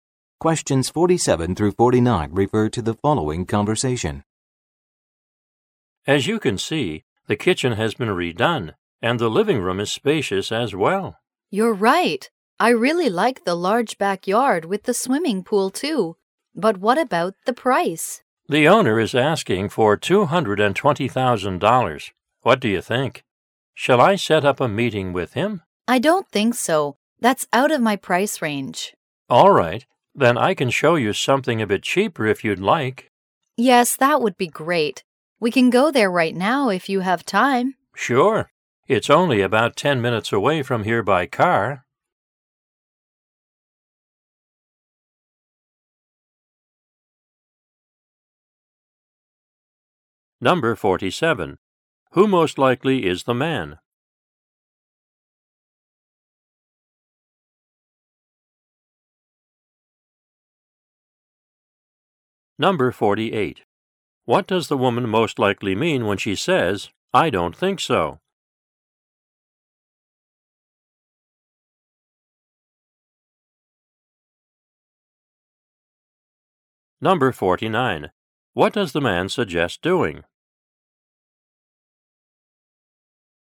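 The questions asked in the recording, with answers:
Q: Who most likely is the man?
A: A real estate agent

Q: What does the man suggest doing?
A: Showing her a cheaper house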